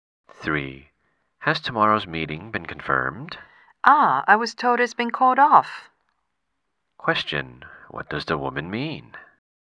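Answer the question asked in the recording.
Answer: The meeting has been cancelled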